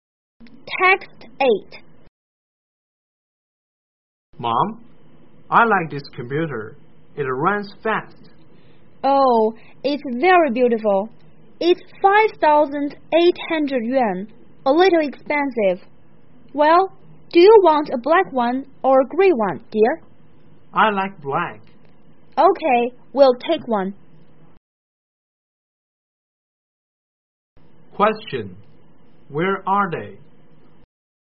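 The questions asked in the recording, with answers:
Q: Where are they?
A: In a shop selling computers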